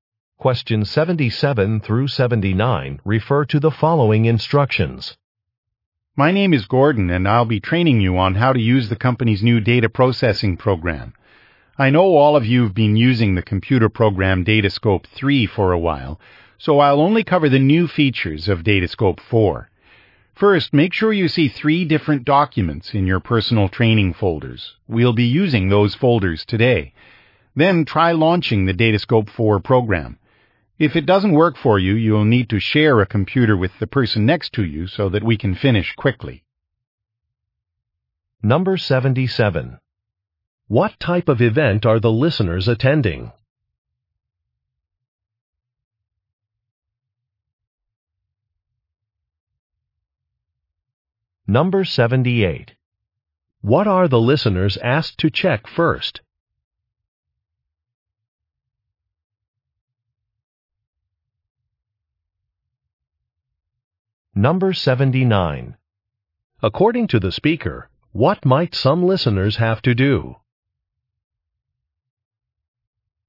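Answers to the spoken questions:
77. A software training session
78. That there are three documents in their training folders
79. Share a computer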